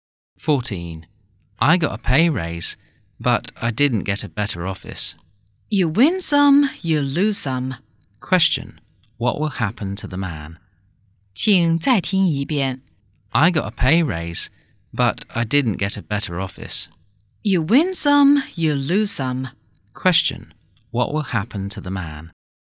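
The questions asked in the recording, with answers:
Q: Question, what will happen to the man?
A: He will get a pay raise but not a better office.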